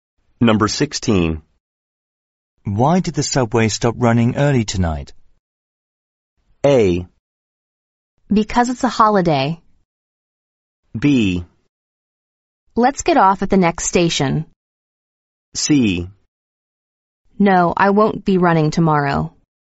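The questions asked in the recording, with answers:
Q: Why did the subway stop running early tonight?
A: A: Because it's a holiday.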